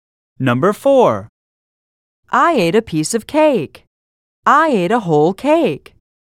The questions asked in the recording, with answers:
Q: I ate a piece of cake. I ate a whole cake.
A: Different is the correct answer.